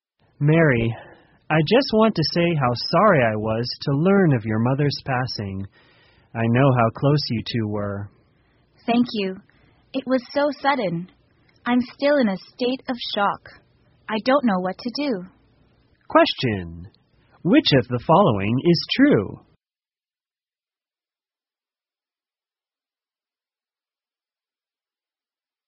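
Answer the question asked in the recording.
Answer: Mary's mother died suddenly and Mary is still in shock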